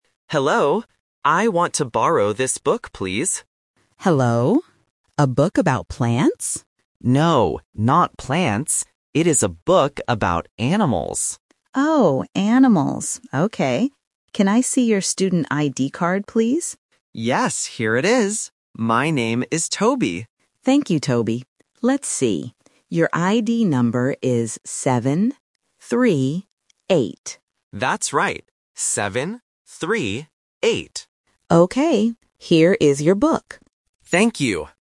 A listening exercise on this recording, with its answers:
Listen to the conversation between a student and a librarian. Choose the correct answer (A, B, or C).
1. What is the book about?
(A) Plants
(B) Animals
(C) Computers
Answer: Animals

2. What does the librarian ask to see?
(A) A student ID card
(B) A notebook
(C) Some money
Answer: A student ID card

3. What is Toby's ID number?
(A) 7 - 8 - 3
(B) 7 - 3 - 9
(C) 7 - 3 - 8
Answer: 7 - 3 - 8

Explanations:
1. The boy corrects the librarian by saying, "No, not plants. It is a book about animals." Option (A) is the trap because the librarian mentions it first, but it is rejected. Option (C) is not mentioned.
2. The librarian clearly asks: "Can I see your student ID card, please?". Option (B) and (C) are plausible things in a school setting but are not mentioned in the audio.
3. The librarian reads the ID number as "seven - three - eight," and Toby confirms it. Options (A) and (B) are phonetic traps using similar numbers or rearranging the order, which is a common test technique for A1 level.

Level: A1

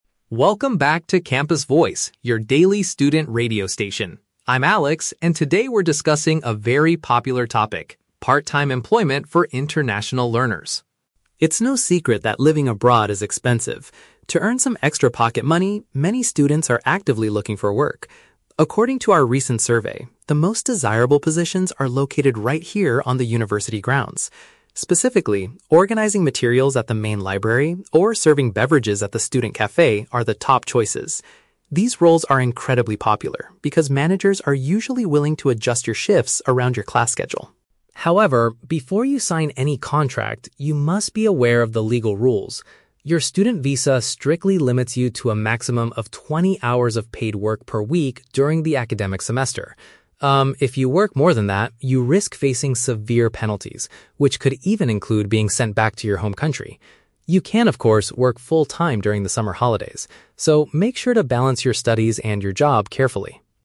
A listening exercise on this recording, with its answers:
Listen to a campus radio reporter delivering an education news update. Read the questions below and choose the correct answer (A, B, or C) for each.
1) Why are positions at the library and the cafe highly preferred by students?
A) Because the supervisors are flexible with their working hours.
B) Because the hourly wages are much higher than average.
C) Because they are allowed to study quietly while on duty.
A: Because the supervisors are flexible with their working hours.

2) What is the main employment rule for international students during the academic term?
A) They are completely forbidden from earning money off-campus.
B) They are restricted to a maximum of twenty hours of labor per week.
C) They must obtain a special permission letter from their professors.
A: They are restricted to a maximum of twenty hours of labor per week.

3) What is a potential consequence if a student disobeys the working regulations?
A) They might be forced to leave the host nation.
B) They will be required to pay a large financial penalty.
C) They will automatically fail their current university classes.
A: They might be forced to leave the host nation.

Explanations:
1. The Key (Correct): The reporter explains that these roles are popular because "managers are usually willing to adjust your shifts around your class schedule." (Paraphrased: managers = supervisors; adjust your shifts = flexible with their working hours). The Trap: Option (C) is a plausible assumption for a library job, but it is not mentioned in the audio. Not mentioned: Option (B) is incorrect because salaries or hourly wages are never discussed.
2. The Key (Correct): The reporter clearly states that the visa "strictly limits you to a maximum of twenty hours of paid work per week." (Paraphrased: paid work = labor).

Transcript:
Reporter: Welcome back to Campus Voice, your daily student radio station. I'm Alex, and today we're discussing a very popular topic: part-time employment for international learners.
It's no secret that living abroad is expensive. To earn some extra pocket money, many students are actively looking for work. According to our recent survey, the most desirable positions are located right here on the university grounds. Specifically, organizing materials at the main library or serving beverages at the student cafe are the top choices. These roles are incredibly popular because managers are usually willing to adjust your shifts around your class schedule.
However, before you sign any contract, you must be aware of the legal rules. Your student visa strictly limits you to a maximum of twenty hours of paid work per week during the academic semester. Um, if you work more than that, you risk facing severe penalties, which could even include being sent back to your home country. You can, of course, work full-time during the summer holidays. So, make sure to balance your studies and your job carefully!

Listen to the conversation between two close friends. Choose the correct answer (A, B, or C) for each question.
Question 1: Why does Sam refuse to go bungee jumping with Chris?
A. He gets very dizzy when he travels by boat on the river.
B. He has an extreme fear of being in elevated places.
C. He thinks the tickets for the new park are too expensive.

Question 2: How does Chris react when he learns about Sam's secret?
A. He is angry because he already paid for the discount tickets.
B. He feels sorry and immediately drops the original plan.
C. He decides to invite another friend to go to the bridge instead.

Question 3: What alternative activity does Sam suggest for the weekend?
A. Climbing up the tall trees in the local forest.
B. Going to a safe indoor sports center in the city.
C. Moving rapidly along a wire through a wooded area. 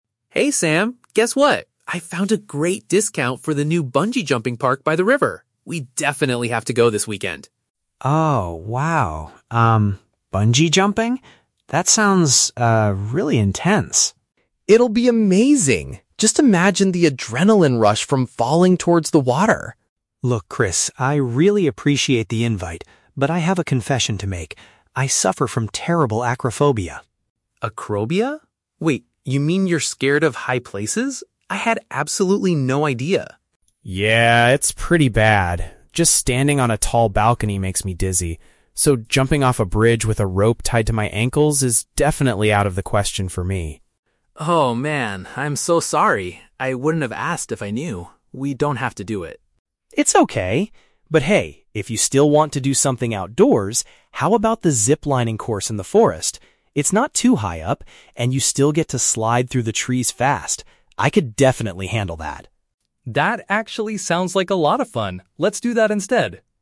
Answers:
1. He has an extreme fear of being in elevated places.
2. He feels sorry and immediately drops the original plan.
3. Moving rapidly along a wire through a wooded area.

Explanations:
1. Sam confesses he has "acrophobia" and explains that he is "scared of high places". Option B uses "elevated places," which is a perfect synonym for high places. Why the traps are wrong: Option A is a trap; the audio mentions the "river" and getting "dizzy" (on a balcony), but he does not get dizzy from boats. Option C is plausible, and the audio mentions a "discount", but money is not the reason he refuses.
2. Chris says, "Oh man, I'm so sorry! ... We don't have to do it." This means he apologizes and cancels the bungee jumping plan. Why the traps are wrong: Option A is a trap; the word "discount" is mentioned early on, but Chris is completely understanding, not angry. Option C is a plausible real-world action, but it never happens in the conversation.
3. Sam suggests the "zip-lining course in the forest" where you "slide through the trees fast." Moving rapidly along a wire is the exact description of zip-lining, and "wooded area" means forest. Why the traps are wrong: Option A is a trap; it uses the words "trees" and "forest" from the audio, but the activity is sliding, not climbing. Option B is plausible because it sounds safe, but Sam suggests an outdoor activity, not an indoor one.

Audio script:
Chris: Hey Sam! Guess what? I found a great discount for the new bungee jumping park by the river. We definitely have to go this weekend!
Sam: Oh, wow... um, bungee jumping? That sounds, uh, really intense.
Chris: It'll be amazing! Just imagine the adrenaline rush from falling towards the water!
Sam: Look, Chris, I really appreciate the invite, but I have a confession to make. I suffer from terrible acrophobia.
Chris: Acrophobia? Wait, you mean you're scared of high places? I had absolutely no idea!
Sam: Yeah, it's pretty bad. Just standing on a tall balcony makes me dizzy. So, jumping off a bridge with a rope tied to my ankles is definitely out of the question for me.
Chris: Oh man, I'm so sorry! I wouldn't have asked if I knew. We don't have to do it.
Sam: It's okay! But hey, if you still want to do something outdoors, how about the zip-lining course in the forest? It's not too high up, and you still get to slide through the trees fast. I could definitely handle that.

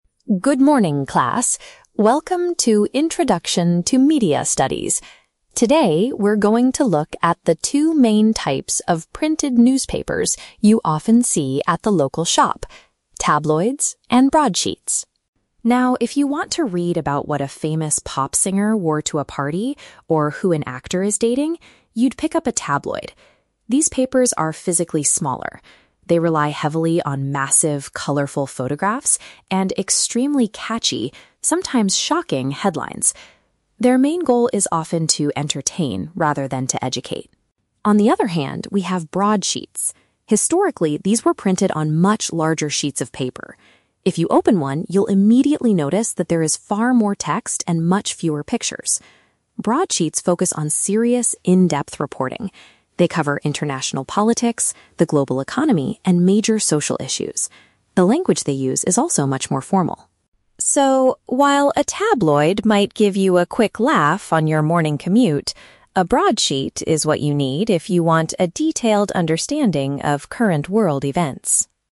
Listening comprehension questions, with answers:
Listen to a teacher giving a lecture on media. Choose the correct answer (A, B, or C) for each question.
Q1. What is the main focus of a tabloid's content?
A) Entertaining stories about celebrities and gossip.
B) In-depth analysis of the global financial market.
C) Educational articles written for university students.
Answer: Entertaining stories about celebrities and gossip.

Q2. How do broadsheets visually differ from tabloids?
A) They feature much larger and more colorful photographs.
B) They contain a significantly higher amount of written words.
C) They are printed on a special type of recycled paper.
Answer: They contain a significantly higher amount of written words.

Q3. According to the teacher, why should a person choose to read a broadsheet?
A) To have a quick laugh while traveling to work.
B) To find out the truth about a shocking local scandal.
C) To gain a comprehensive view of international news.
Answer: To gain a comprehensive view of international news.

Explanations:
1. The teacher says tabloids are for reading about "what a famous pop singer wore" or "who an actor is dating", and their goal is to "entertain". Option A paraphrases this perfectly. Option B is the Trap: The "global economy" (financial market) is mentioned, but that is the focus of a broadsheet, not a tabloid. Option C is a plausible guess for a school setting but is not mentioned in the audio.
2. The teacher states that in a broadsheet, "there is far more text". Option B uses synonyms (significantly higher amount of written words = far more text) to express this fact. Option A is the Trap: "Massive, colorful photographs" are mentioned in the audio, but they are a feature of tabloids, not broadsheets. Option C is not mentioned.
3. The teacher concludes that a broadsheet is what you need for a "detailed understanding of current world events". Option C perfectly paraphrases this (comprehensive view = detailed understanding; international news = world events). Option A is the Trap: The teacher mentions getting a "quick laugh on your morning commute" (traveling to work), but that is what a tabloid gives you. Option B uses the word "shocking" from the text, but it is applied incorrectly here.

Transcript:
Teacher: Good morning, class. Welcome to Introduction to Media Studies. Today, we're going to look at the two main types of printed newspapers you often see at the local shop: tabloids and broadsheets.
Now, if you want to read about what a famous pop singer wore to a party or who an actor is dating, you'd pick up a tabloid. These papers are physically smaller. They rely heavily on massive, colorful photographs and extremely catchy, sometimes shocking, headlines. Their main goal is often to entertain rather than to educate.
On the other hand, we have broadsheets. Historically, these were printed on much larger sheets of paper. If you open one, you'll immediately notice that there is far more text and much fewer pictures. Broadsheets focus on serious, in-depth reporting. They cover international politics, the global economy, and major social issues. The language they use is also much more formal.
So, while a tabloid might give you a quick laugh on your morning commute, a broadsheet is what you need if you want a detailed understanding of current world events.

